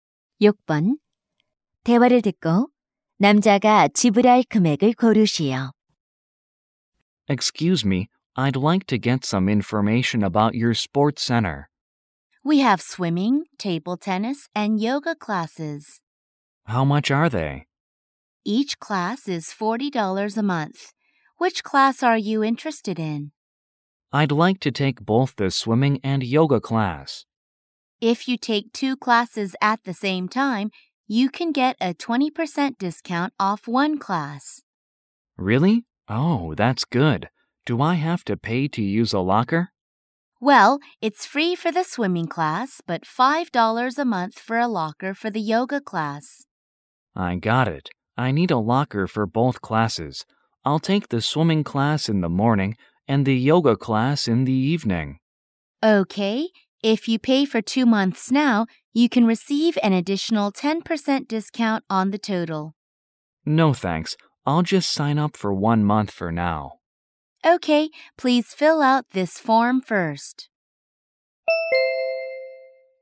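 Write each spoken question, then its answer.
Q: 대화를 듣고 남자가 지불할 금액을 고르시오.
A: $77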